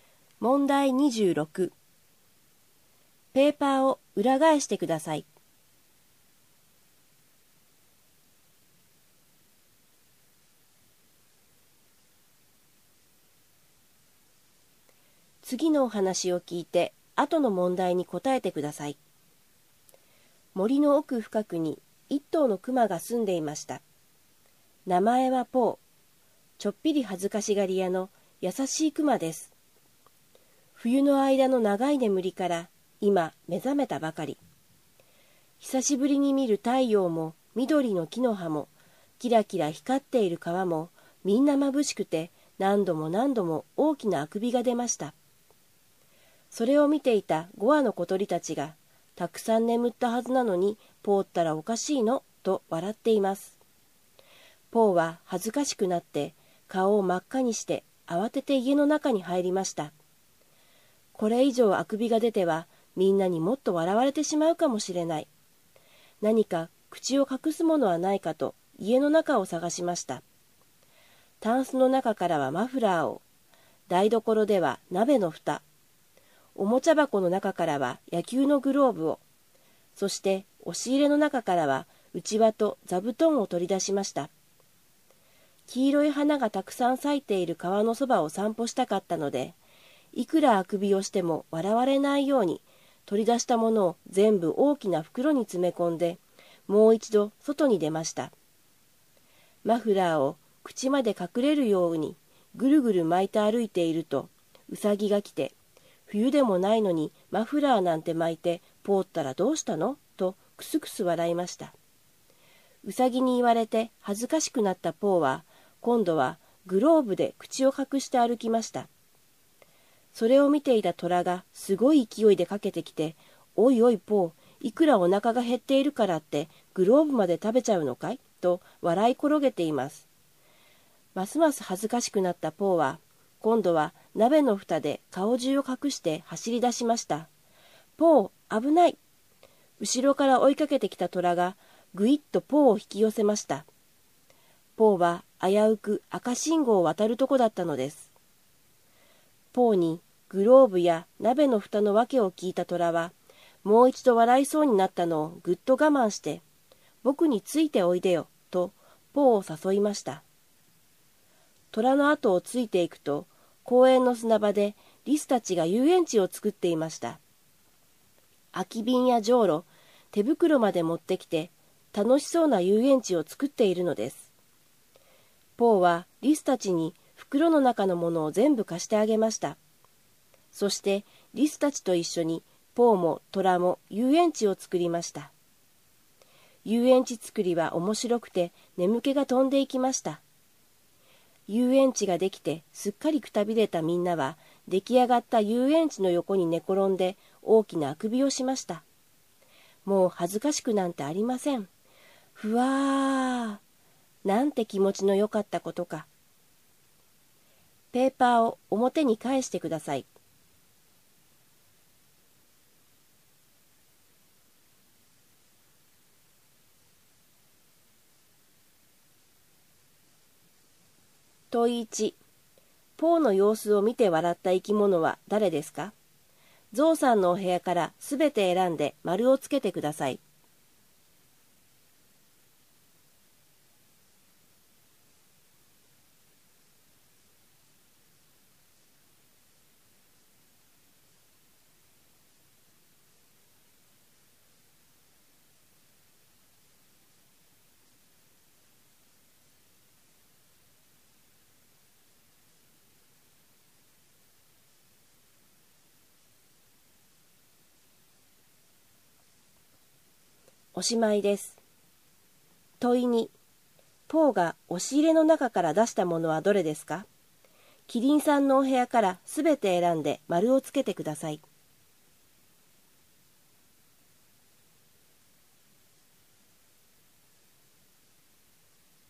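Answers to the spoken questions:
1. 小鳥、ウサギ、トラ
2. 内輪と座布団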